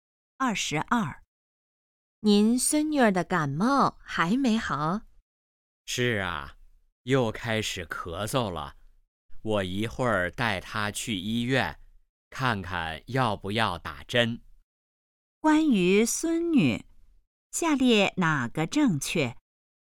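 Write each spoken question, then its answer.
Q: 关于孙女,下列哪个正确?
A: 感冒还没好,又开始咳嗽了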